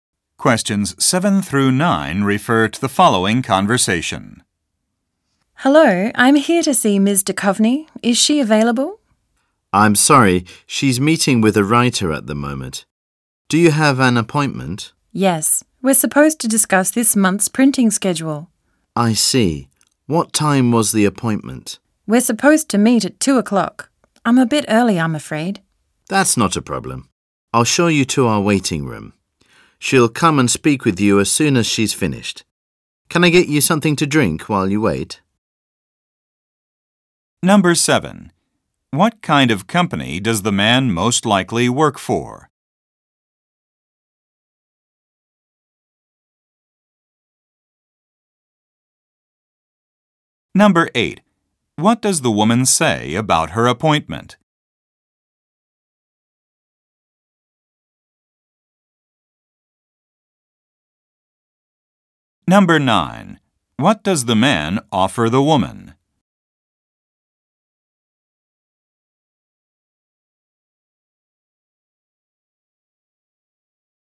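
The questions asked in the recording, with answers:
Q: What does the woman say about her appointment?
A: She is early; it's at 2 o'clock

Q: What does the man offer the woman?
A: Something to drink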